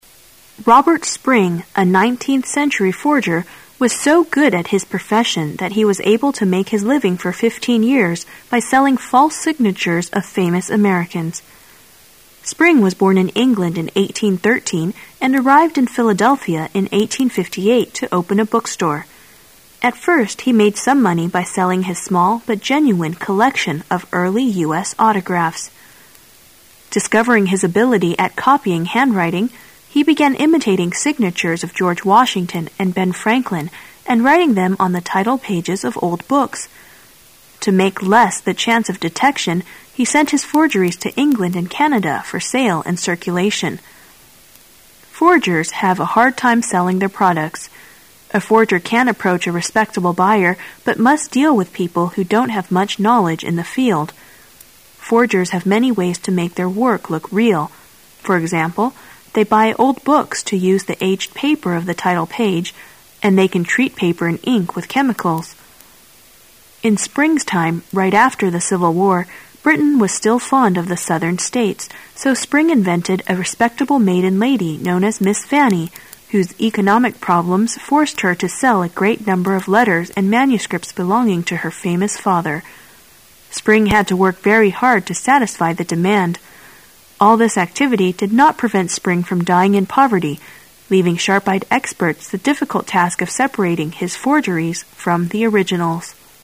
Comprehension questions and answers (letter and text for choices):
Questions 18 to 20 are based on the following passage. At the end of the passage, you will be given 15 seconds to answer the questions. Now listen to the passage.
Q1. After the Civil War, there was a great demand in Britain for ______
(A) southern money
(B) signatures of George Washington and Ben Franklin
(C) southern manuscripts and letters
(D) Civil War battle plans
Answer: (C) southern manuscripts and letters

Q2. It can be concluded that forgeries are usually sold to ______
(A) sharp-eyed experts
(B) laypersons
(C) book dealers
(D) owners of old books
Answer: (B) laypersons

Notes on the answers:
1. 本题测试对重要信息的理解和推测能力。可以根据文中最后一部分的主要内容,推测出正确答案为C。 respectable adj.可敬的,有名望的 maiden n.少女 adj.未婚的,纯洁的,无经验的 manuscript n.手稿,原稿
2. 本题测试推测能力。可根据文中的关键信息,如"A forger can't approach a respectable buyer but must deal with people who don't have much knowledge in the field'',推测出伪造物通常会被卖给没有相关领域知识的人,即外行(layperson),因此正确答案为B。 sharp-eyed adj.目光敏锐的

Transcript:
[解析] 18-20 Robert Spring, a 19th century forger, was so good at his profession that he was able to make his living for 15 years by selling false signatures of famous Americans. Spring was born in England in 1813 and arrived in Philadelphia in 1858 to open a bookstore. At first he made some money by selling his small but genuine collection of early U. S. autographs. Discovering his ability at copying handwriting, he began imitating signatures of George Washington and Ben Franklin and writing them on the title pages of old books. To make less the chance of detection, he sent his forgerics to England and Canada for sale and circulation. Forgers have a hard time selling their products. A forger can't approach a respectable buyer but must deal with people who don't have much knowledge in the field. Forgers have many ways to make their work look real. For example, they buy old books to use the aged paper of the title page, and they can treat paper and ink with chemicals. In Spring's time, right after the Civil War, Britain was still fond of the Southern states, so Spring invented a respectable maiden lady known as Miss Fanny, whose economic problems forced her to scll a great number of letters and manuscripts belonging to her famous father. Spring had to work very hard to satisfy the demand. All this activity did not prevent Spring from dying in poverty, leaving sharp-eyed experts the difficult task of separating his forgeries from the originals.